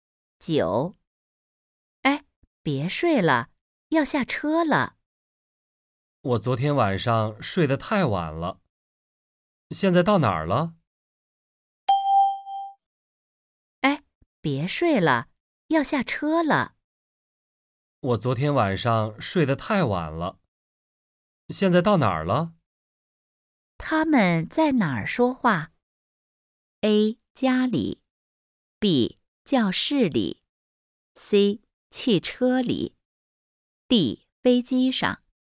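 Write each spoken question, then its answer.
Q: 他们在哪儿说话?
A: C: 汽车里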